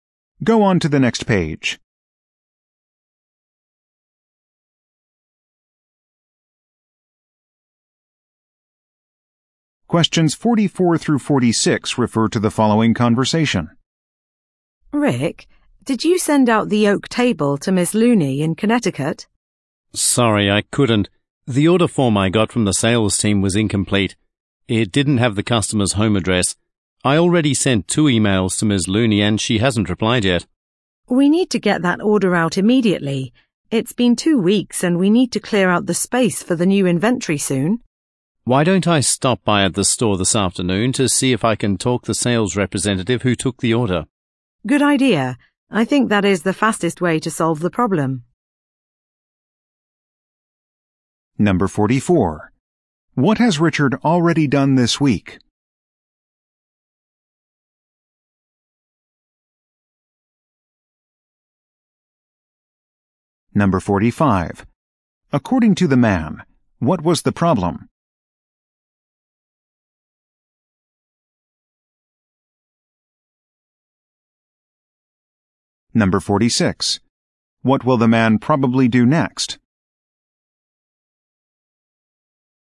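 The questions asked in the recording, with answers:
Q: According to the man, what was the problem?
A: The order form didn't have the customer's home address

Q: What will the man probably do next?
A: Go to the store to talk to the sales representative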